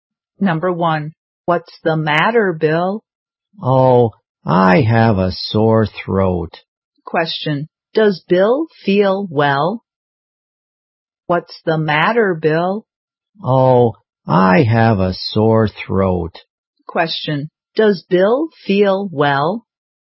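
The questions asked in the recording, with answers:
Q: does Bill feel well?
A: No, he has a sore throat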